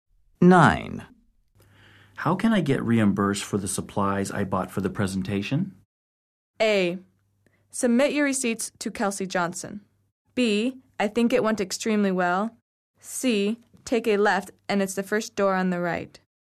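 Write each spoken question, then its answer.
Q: How can I get reimbursed for the supplies I bought for the presentation?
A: A: Submit your receipts to Kelsey Johnson.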